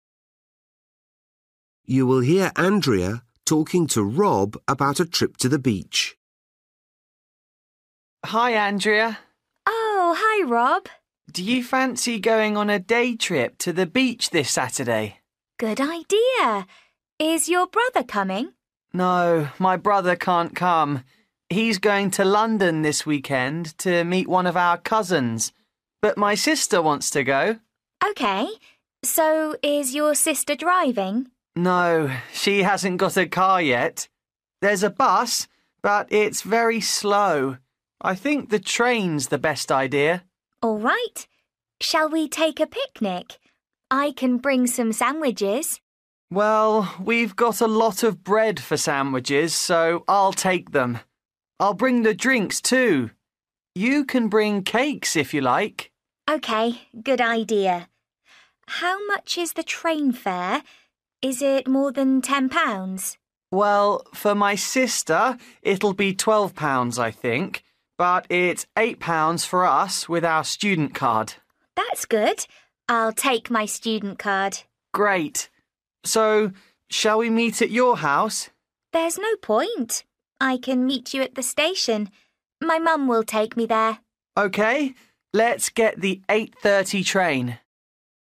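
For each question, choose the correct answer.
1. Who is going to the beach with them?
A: Rob's sister

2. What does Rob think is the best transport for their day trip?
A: the train

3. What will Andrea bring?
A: cakes

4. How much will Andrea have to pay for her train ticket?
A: £8

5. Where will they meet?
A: at the station

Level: Luyện nghe trình độ A2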